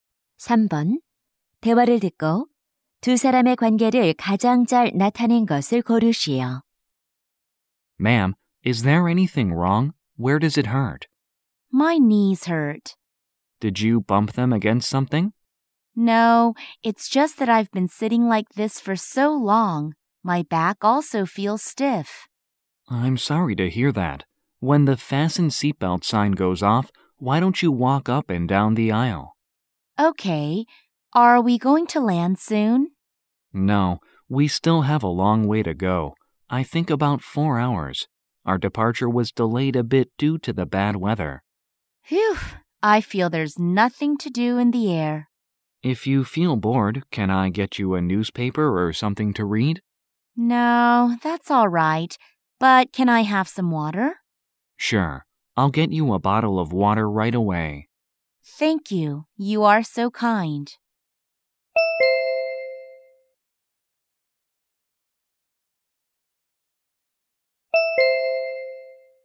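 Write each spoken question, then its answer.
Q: 대화를 듣고 두 사람의 관계를 가장 잘 나타낸 것을 고르시오.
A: 승무원 - 승객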